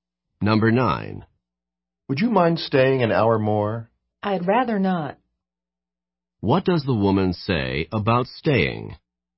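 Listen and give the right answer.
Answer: She would prefer not to stay.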